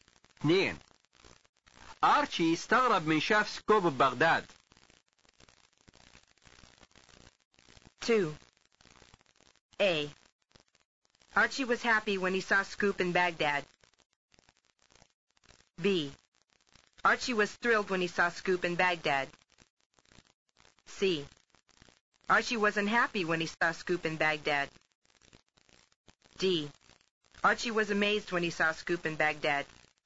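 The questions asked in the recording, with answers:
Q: أرشي استغرب من شاف سكوب ببغداد.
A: D: أرشي was amazed when he saw Scoop in Baghdad.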